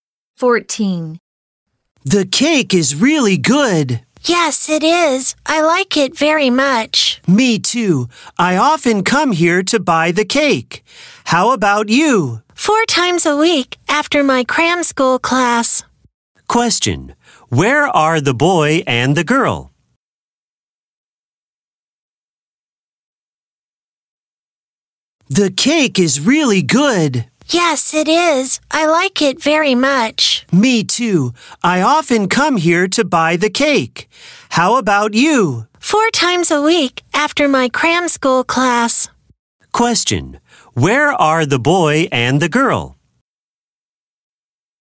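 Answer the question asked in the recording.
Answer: At a cake shop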